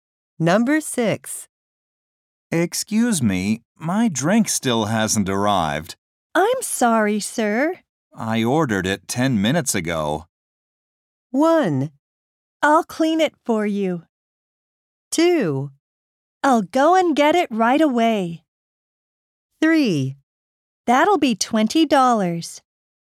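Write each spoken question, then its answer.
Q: I ordered it 10 minutes ago.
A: 2: I'll go and get it right away.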